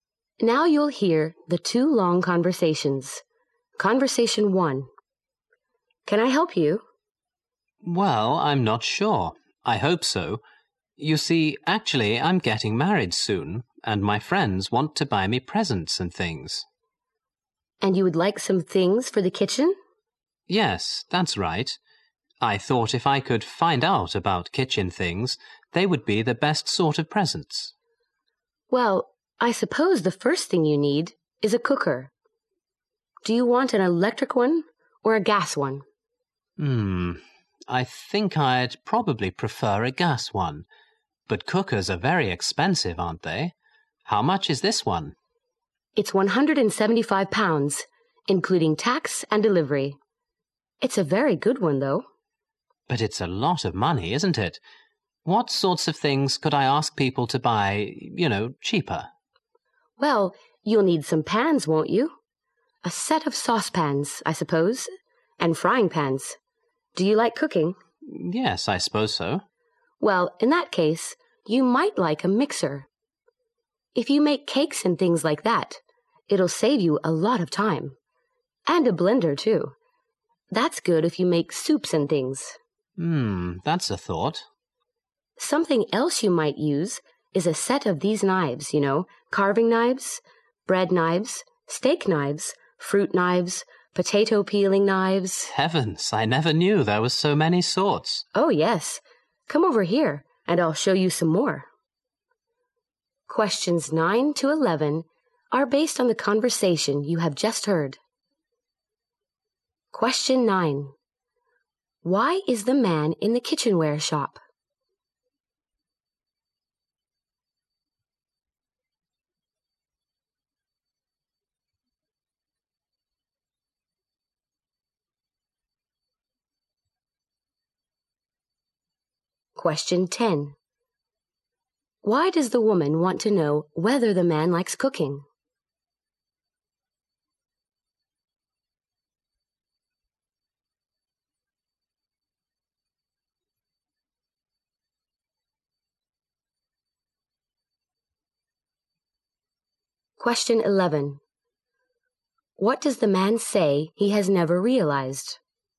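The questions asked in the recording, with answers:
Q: Why is the man in the kitchenware shop?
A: He is getting married and wants ideas for kitchen gifts.

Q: Why does the woman want to know whether the man likes cooking?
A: To suggest a mixer.

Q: What does the man say he has never realized?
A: That there are so many sorts of knives.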